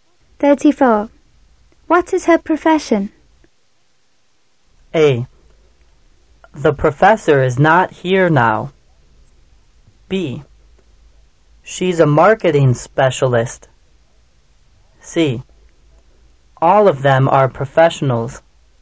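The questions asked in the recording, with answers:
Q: What is her profession?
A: B: She's a marketing specialist.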